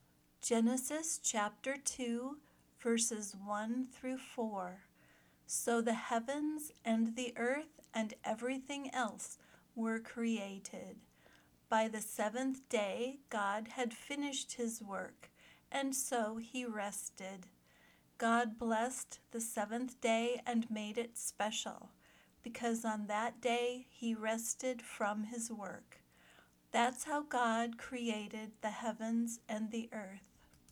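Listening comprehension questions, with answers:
Find the answers to these two questions as you listen:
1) In the first sentence, what three things did God create?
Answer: The heavens, the earth and everything else

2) Why did God bless the seventh day and make it special?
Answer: Because on that day he rested from his work

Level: Beginner Lesson 9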